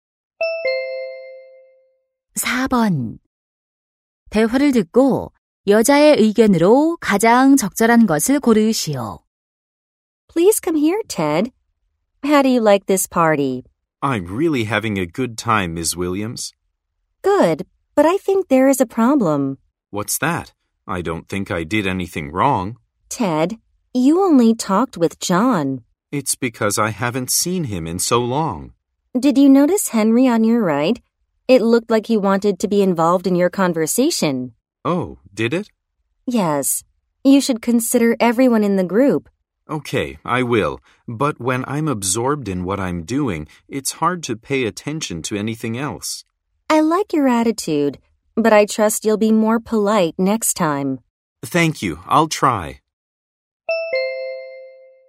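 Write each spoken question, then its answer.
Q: 대화를 듣고 여자의 의견으로 가장 적절한 것을 고르시오.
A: 모임에서는 모든 사람을 배려해야 한다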